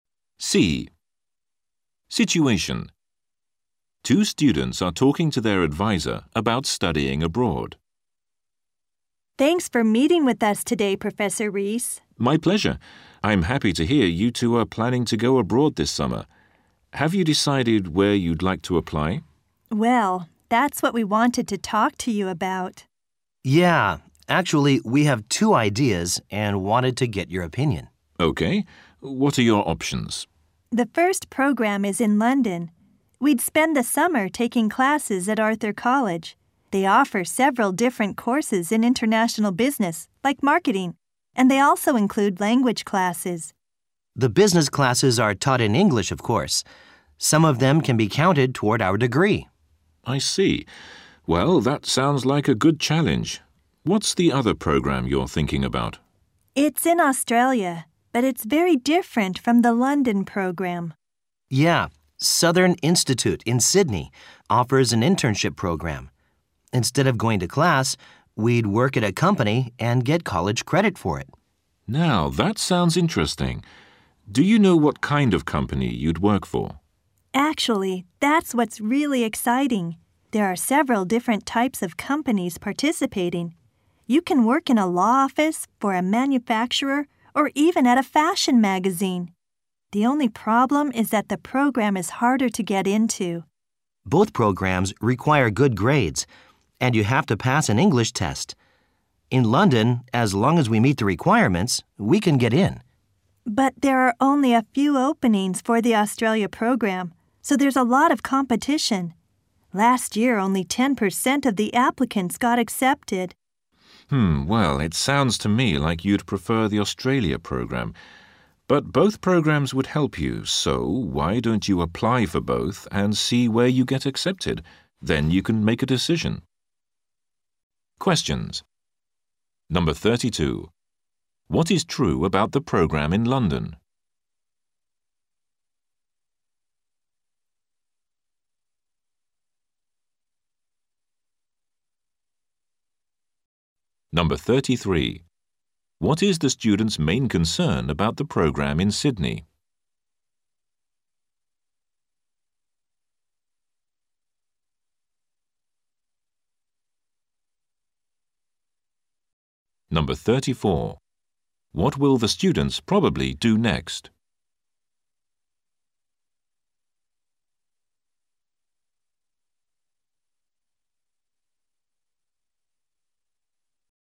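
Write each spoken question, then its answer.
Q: What is true about the program in London?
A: Some classes can count toward their degree.

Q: What is the student's main concern about the program in Sydney?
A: It is hard to get into.

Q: What will the students probably do next?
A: Apply to both programs.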